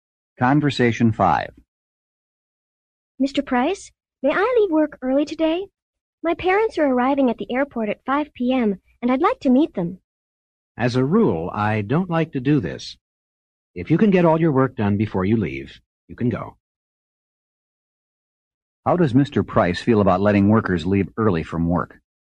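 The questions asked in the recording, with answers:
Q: How does Mr. Price feel about letting workers leave early from work?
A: He generally doesn't like it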